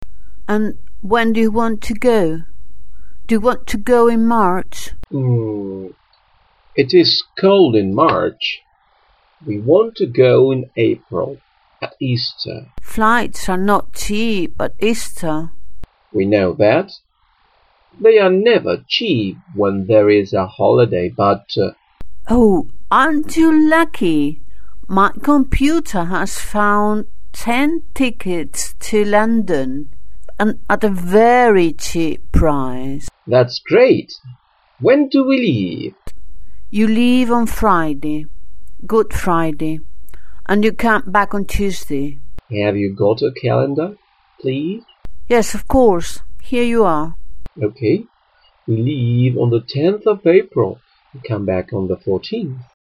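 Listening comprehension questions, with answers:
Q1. The students want to travel in March because the weather is nice in that month.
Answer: False

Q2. At the last moment, the travel agent finds a cheap flight on Good Friday.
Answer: True

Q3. The students will spend (pasarán) three days in London.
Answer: False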